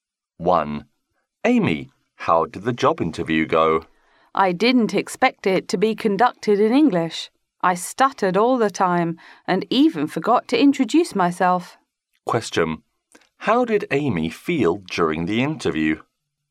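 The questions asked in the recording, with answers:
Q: How did Amy feel during the interview?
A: Nervous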